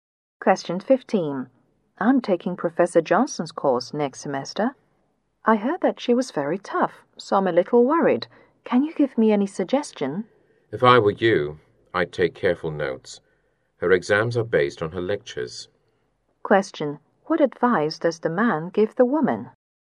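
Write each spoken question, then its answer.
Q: What advice does the man give the woman?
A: Take careful notes in the lectures.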